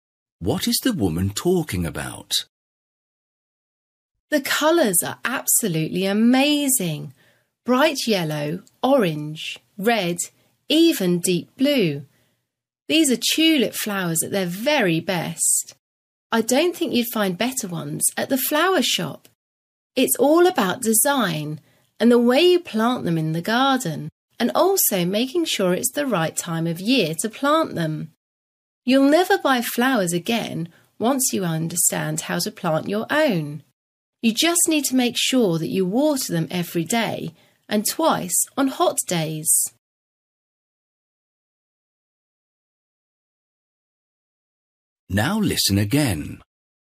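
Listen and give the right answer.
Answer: Growing tulips in the garden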